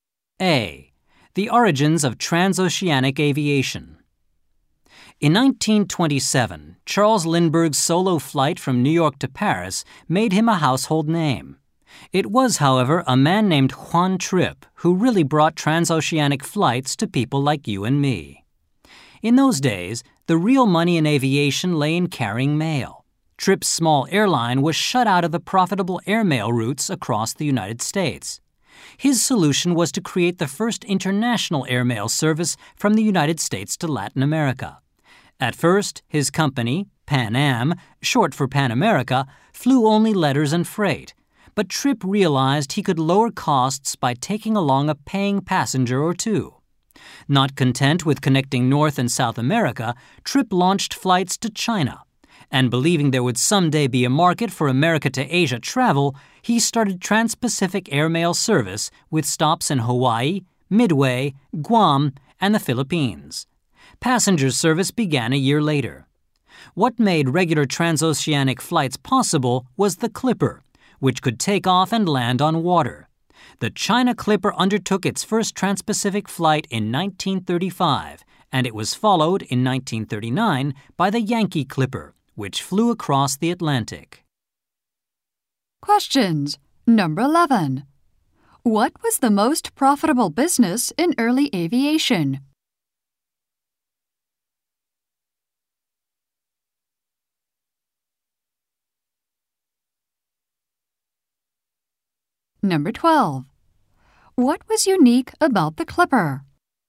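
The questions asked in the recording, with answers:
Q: What was the most profitable business in early aviation?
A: Carrying mail

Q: What was unique about the Clipper?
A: It could take off and land on water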